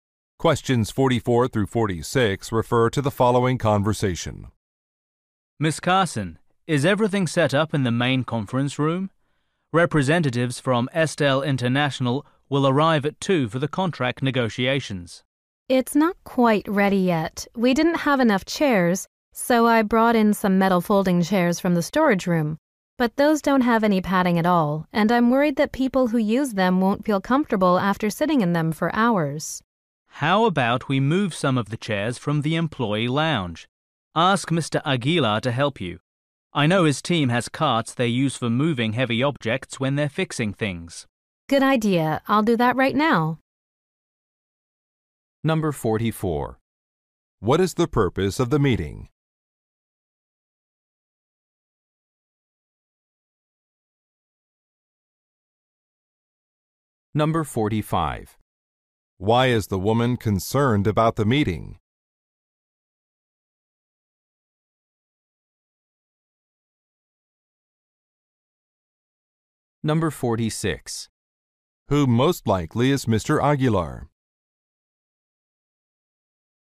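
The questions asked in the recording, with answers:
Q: What is the purpose of the meeting?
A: Contract negotiations

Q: Why is the woman concerned about the meeting?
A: The chairs may be uncomfortable

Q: Who most likely is Mr. Aguilar?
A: A maintenance worker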